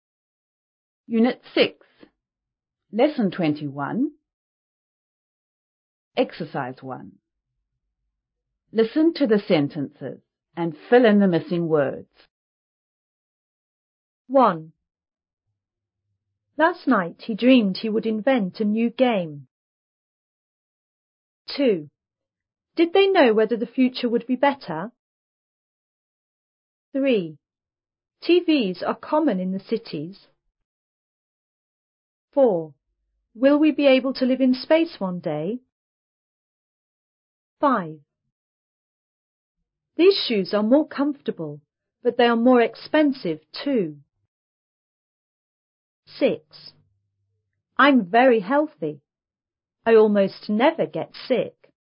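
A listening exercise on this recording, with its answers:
1.Listen to the sentences and fill in the missing word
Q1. Last night,he _______ that he would invent a new ______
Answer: dreamed; game

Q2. Did they know ________ the ________ would be bette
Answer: whether; future

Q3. TVs are ________ in the ________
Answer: common; cities

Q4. Will we be able to _________ in __________ one da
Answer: live; space

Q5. These shoes are more _________ but they are more _________ to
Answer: comfortable; expensive

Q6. I'm very _________ I almost never get ________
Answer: healthy; sick

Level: 5B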